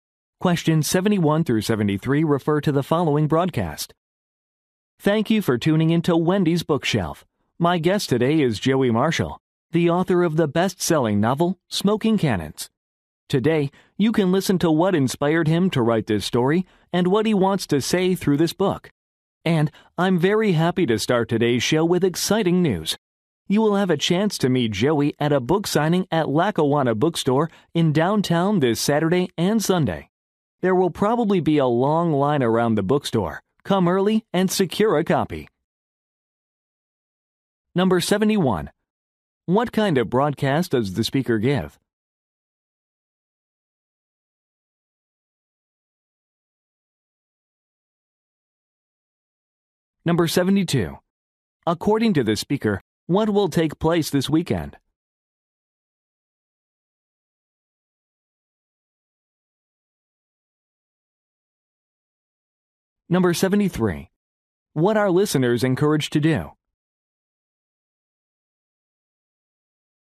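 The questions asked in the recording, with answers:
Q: What kind of broadcast does the speaker give?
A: A radio show about books

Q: According to the speaker, what will take place this weekend?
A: A book signing by Joey Marshall

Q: What are listeners encouraged to do?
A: Come early to get a copy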